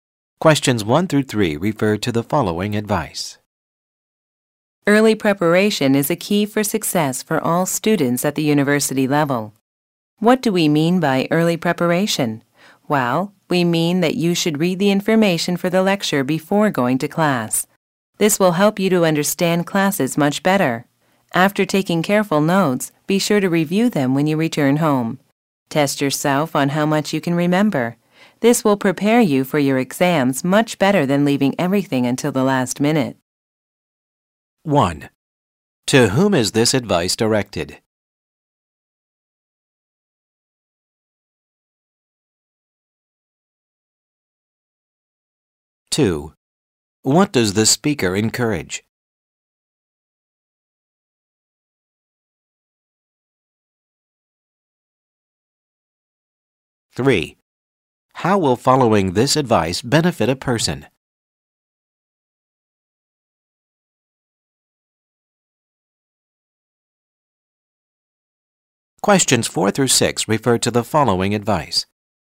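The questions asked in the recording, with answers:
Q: To whom is this advice directed?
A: University students

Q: What does the speaker encourage?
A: Early preparation, such as reading before class

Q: How will following this advice benefit a person?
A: Better understanding of classes and better exam preparation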